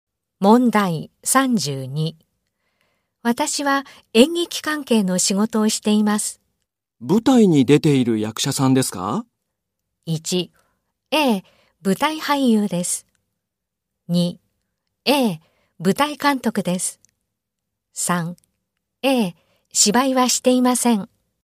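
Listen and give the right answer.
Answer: 1: ええ、舞台俳優です。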